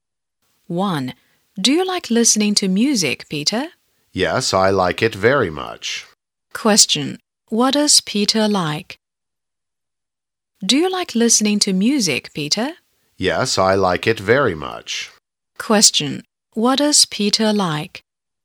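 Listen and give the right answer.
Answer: Listening to music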